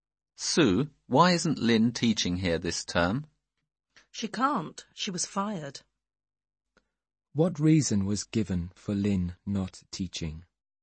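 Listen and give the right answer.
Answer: She was fired.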